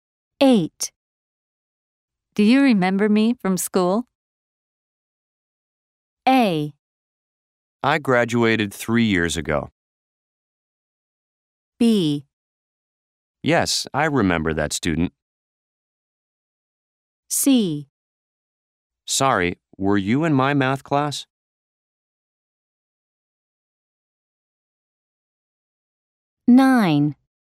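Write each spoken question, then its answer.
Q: Do you remember me from school?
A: C: Sorry, were you in my math class?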